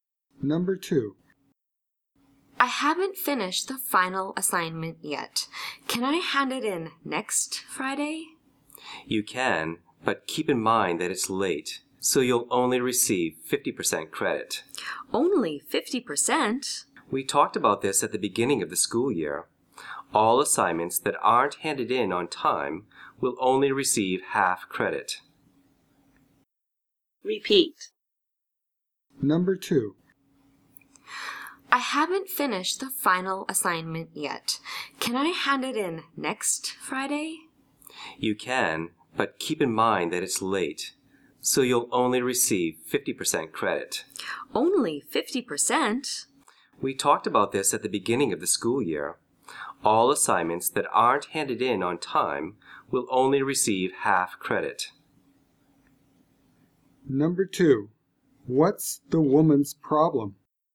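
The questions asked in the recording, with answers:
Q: what's the woman's problem?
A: She hasn't finished her final assignment, so she will only get 50% credit if she hands it in late.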